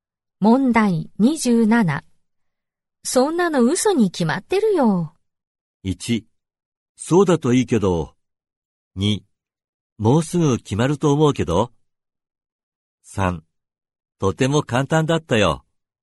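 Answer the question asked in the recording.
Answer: 1: そうだといいけど。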